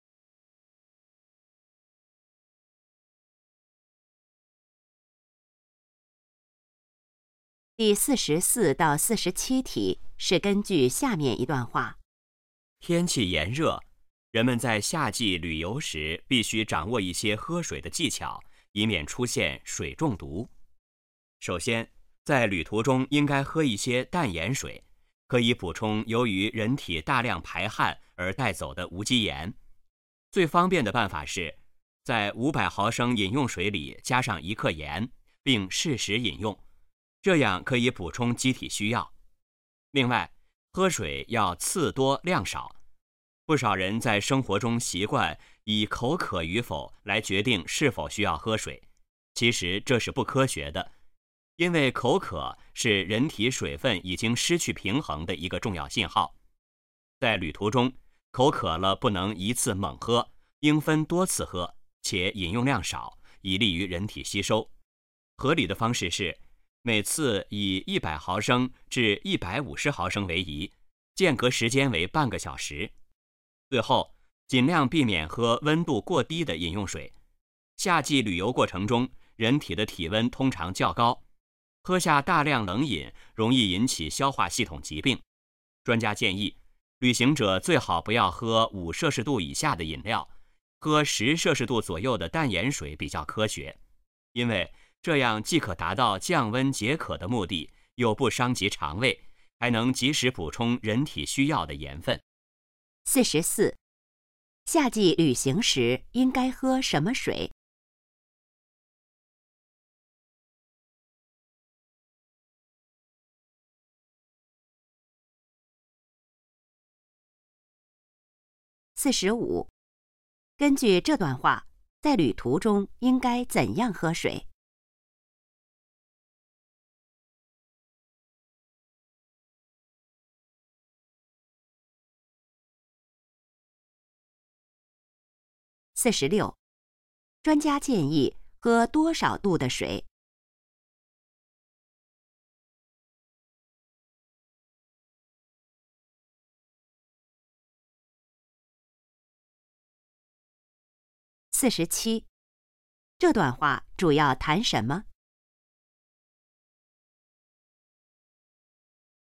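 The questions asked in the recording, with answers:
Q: 夏季旅行时应该喝什么水?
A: 淡盐水

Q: 根据这段话,在旅途中应该怎样喝水?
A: 次多量少

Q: 专家建议喝多少度的水?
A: 10摄氏度左右

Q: 这段话主要谈什么?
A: 夏季旅游喝水的技巧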